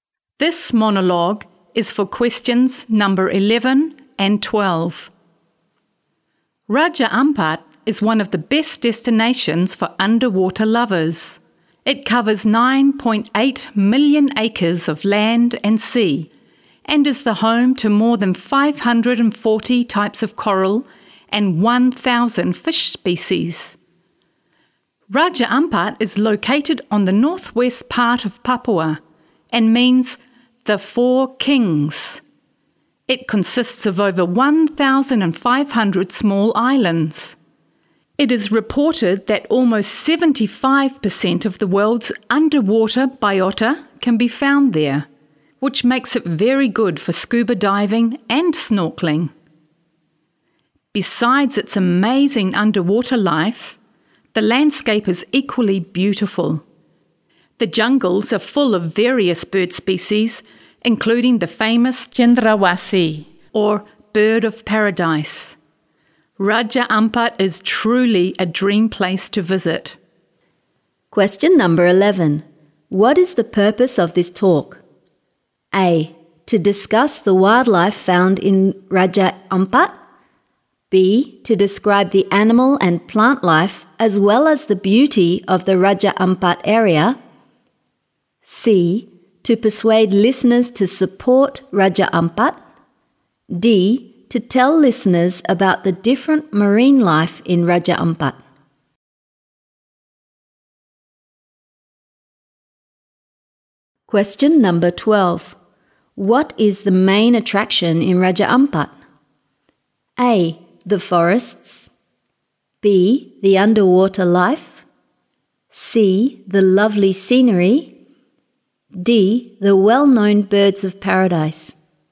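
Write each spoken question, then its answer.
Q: What is the purpose of this talk?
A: B: To describe the animal and plant life as well as the beauty of the Raja Ampat area.

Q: What is the main attraction in Raja Ampat?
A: B: The underwater life.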